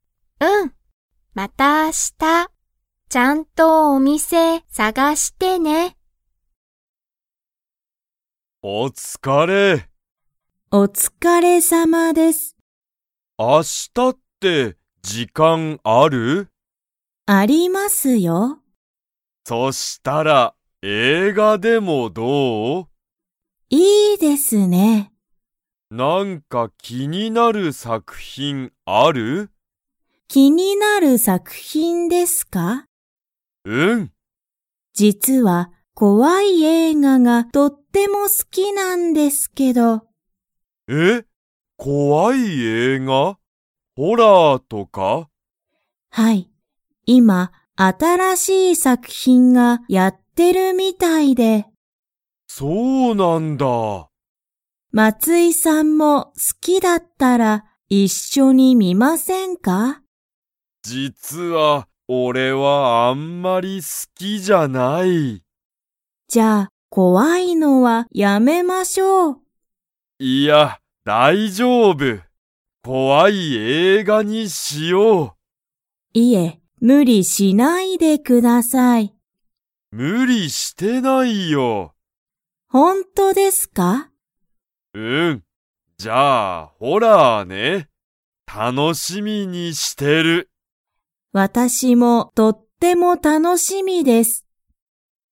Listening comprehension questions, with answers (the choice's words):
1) 佐藤さとうさんは、どんな映画えいがが好すきですか?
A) 怖こわい映画えいが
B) かわいい映画えいが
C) 面白おもしろい映画えいが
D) 難むずかしい映画えいが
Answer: 怖こわい映画えいが

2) 佐藤さとうさんと松井まついさんは、明日あした映画えいがを 。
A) 観みに行いく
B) 観みに行いかない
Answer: 観みに行いく

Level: Level 3